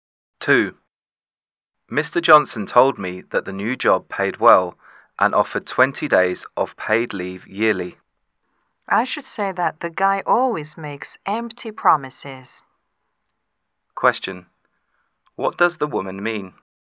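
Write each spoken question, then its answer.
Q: What does the woman mean?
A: Mr. Johnson's promises can't be trusted.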